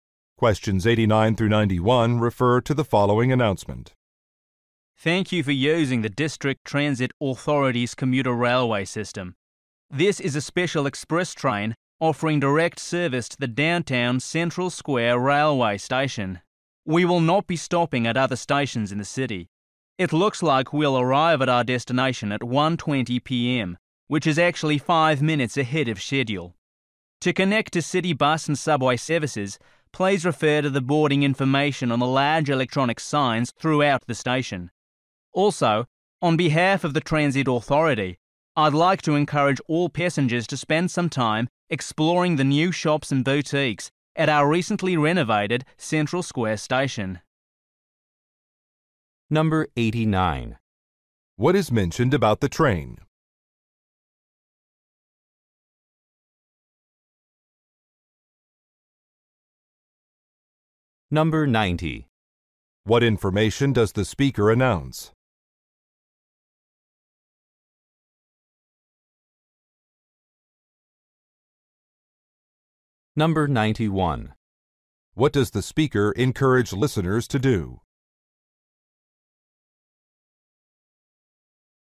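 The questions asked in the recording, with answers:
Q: What is mentioned about the train?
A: It is an express train that makes no other stops

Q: What information does the speaker announce?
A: The train will arrive early, at 1:20 p.m.

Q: What does the speaker encourage listeners to do?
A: Explore the new shops at Central Square station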